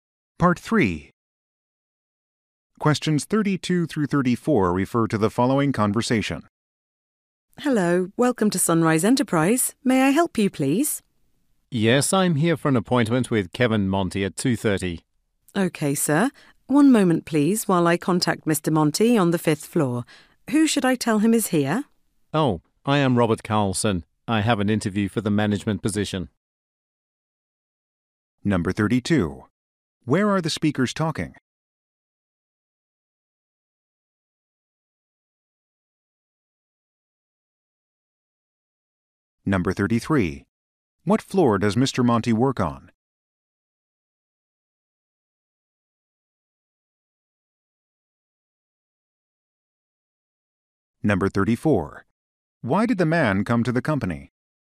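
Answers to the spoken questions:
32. At the reception of Sunrise Enterprise
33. The fifth floor
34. For a job interview for the management position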